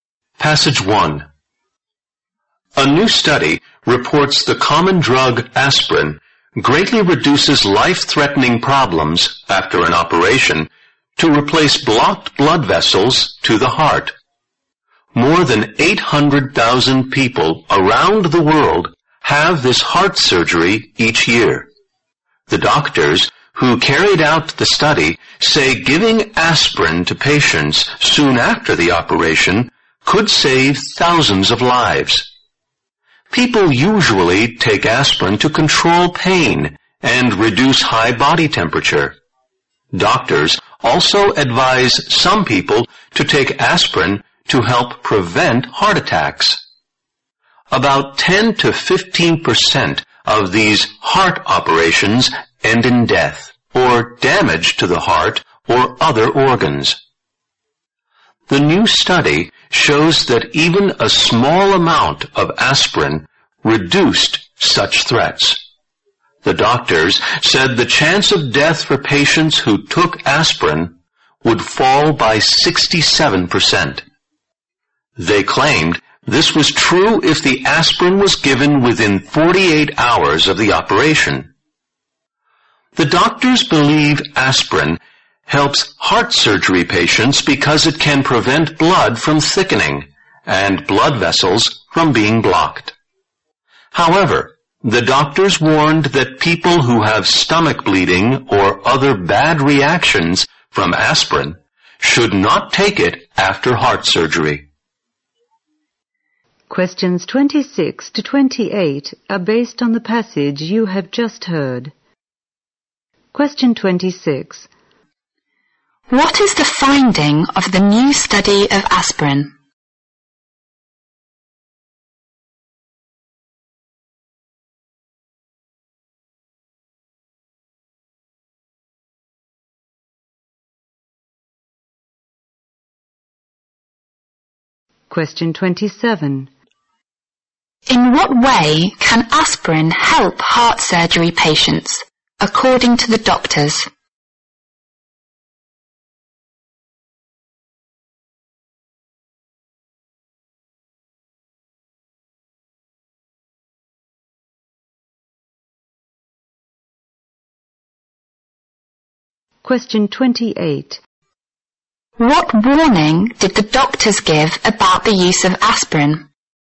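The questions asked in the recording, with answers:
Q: What is the finding of the new study of aspirin?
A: Aspirin greatly reduces life-threatening problems after heart bypass surgery

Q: In what way can aspirin help heart surgery patients, according to the doctors?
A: It prevents blood thickening and blood vessels being blocked

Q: What warning did the doctors give about the use of aspirin?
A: People with stomach bleeding or bad reactions to aspirin should not take it after surgery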